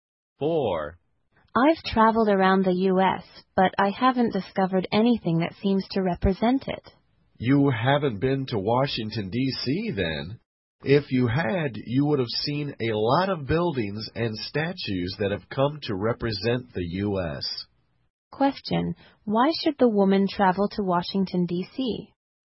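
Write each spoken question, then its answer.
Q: Why should the woman travel to Washington, D.C.?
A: To see buildings and statues that represent the U.S.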